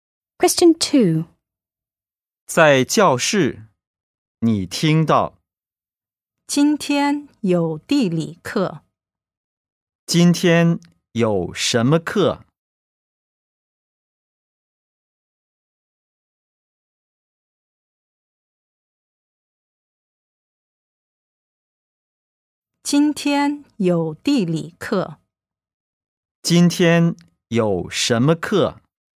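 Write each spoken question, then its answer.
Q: 今天有什么课?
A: 地理课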